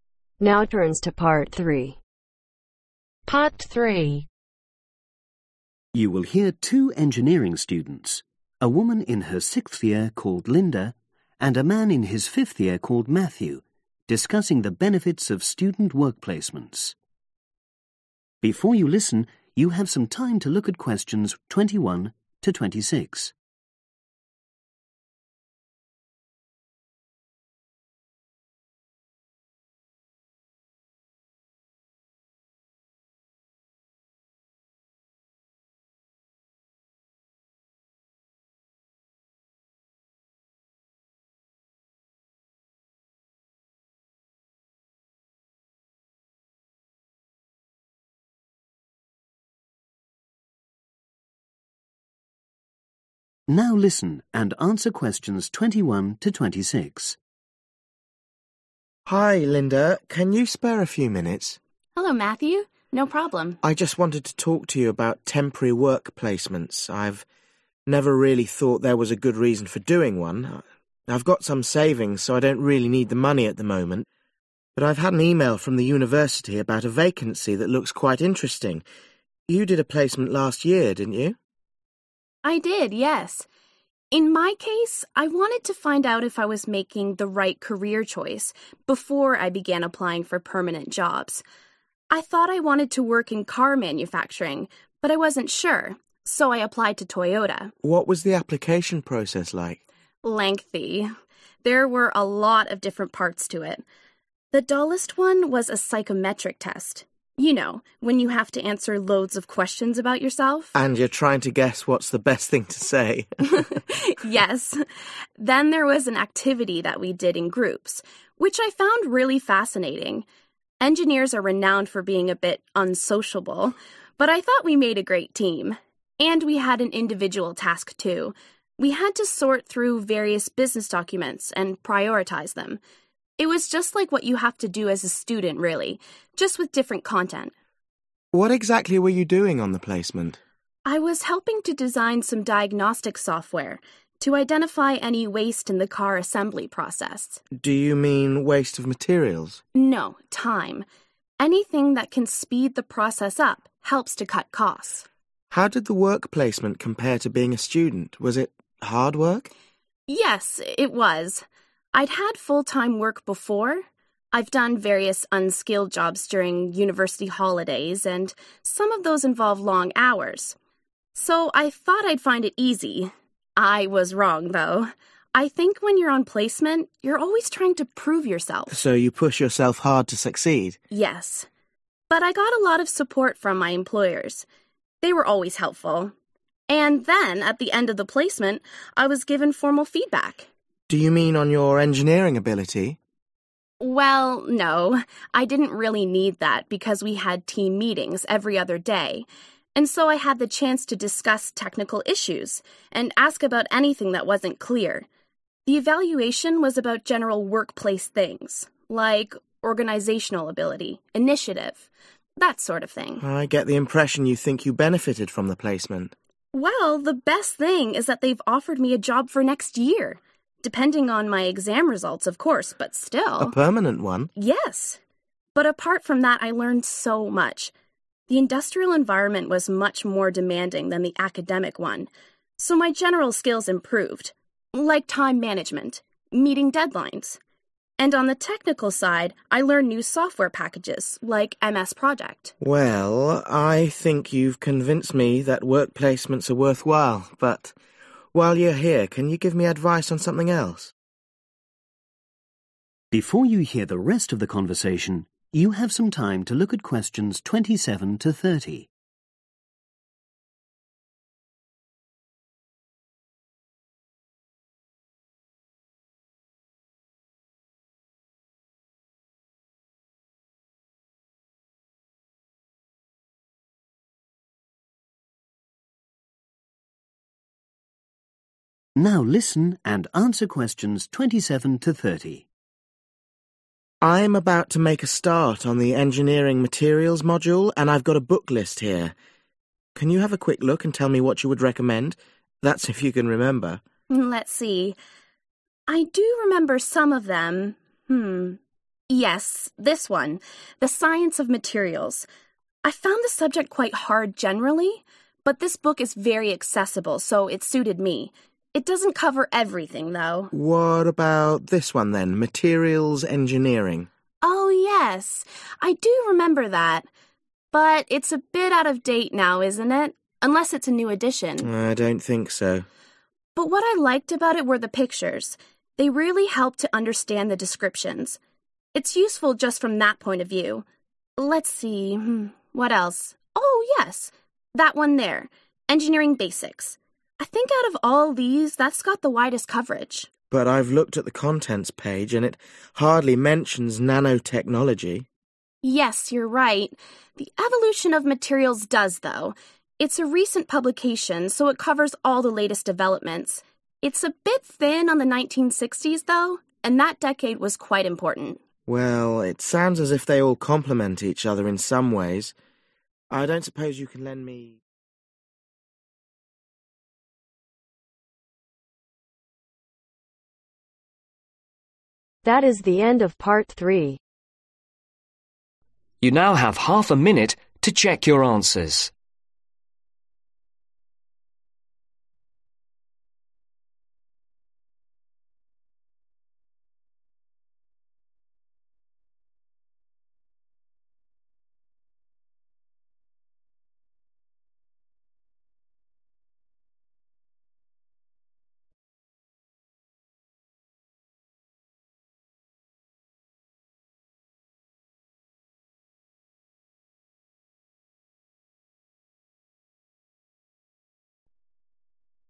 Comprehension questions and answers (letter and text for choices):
Choose the correct letter A , B or C.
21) What is Matthew considering a student work placement ?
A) He was informed as interesting vacancy.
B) He needs some extra a income.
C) He wants to try out a carrier option.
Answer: A) He was informed as interesting vacancy.

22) Which part of the application process did Linda find most interesting ?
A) The psychometric test.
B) The group activity.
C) The individual task.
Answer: B) The group activity.

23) During her work placement, Linda helped find ways to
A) Speed up care assembly.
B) Process waste materials.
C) Calculate the cost of the design faults.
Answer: A) Speed up care assembly.

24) Why did Linda find her work placement tiring ?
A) She wasn't used to full-time work.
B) The working hours were very long.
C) She felt she had to prove her worth.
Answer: C) She felt she had to prove her worth.

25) What did Linda's employers gives her formal feedback on ?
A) engineering ability.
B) Organizational skills.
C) Team working.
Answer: B) Organizational skills.

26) What was the main benefits of Linda's work placement ?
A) Improve academic skills.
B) An offer of work.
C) The opportunity to use new software.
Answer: B) An offer of work.

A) helpful illustrations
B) easy to understand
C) up-to-date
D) comprehensive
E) specialized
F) useful case studies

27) The Science of Materials ............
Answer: B) easy to understand

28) Materials Engineering ............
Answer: A) helpful illustrations

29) Engineering Basics ............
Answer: D) comprehensive

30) Evolution of Materials ............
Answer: C) up-to-date